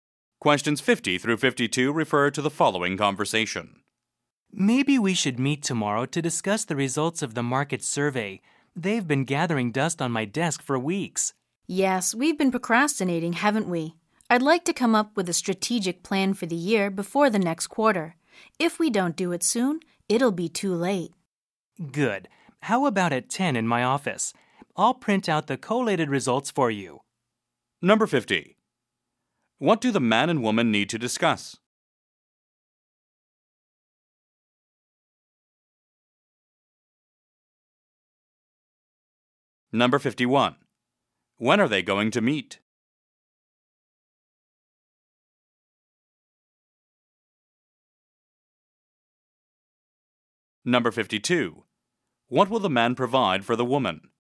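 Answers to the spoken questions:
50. The results of the market survey
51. Tomorrow at 10
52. Printed collated survey results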